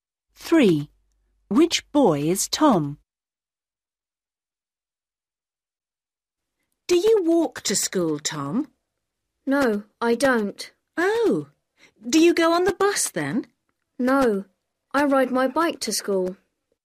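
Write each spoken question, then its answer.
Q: Which boy is Tom?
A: The boy who rides his bike to school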